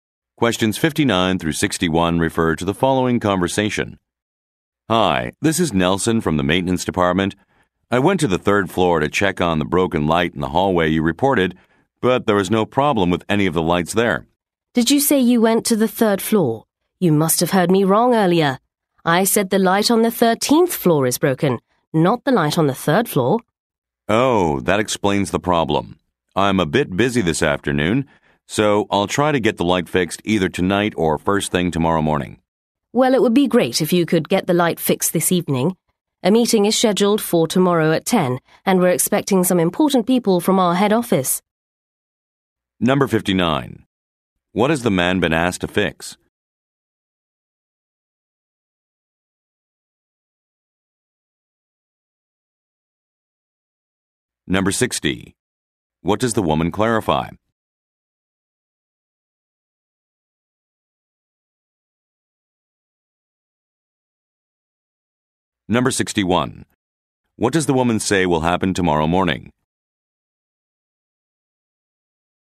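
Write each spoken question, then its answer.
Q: What has the man been asked to fix?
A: A broken hallway light

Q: What does the woman clarify?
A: The broken light is on the 13th floor, not the third

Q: What does the woman say will happen tomorrow morning?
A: A meeting with important people from the head office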